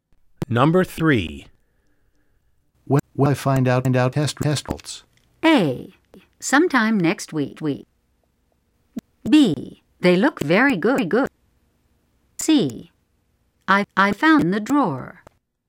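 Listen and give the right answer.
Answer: A: Sometime next week.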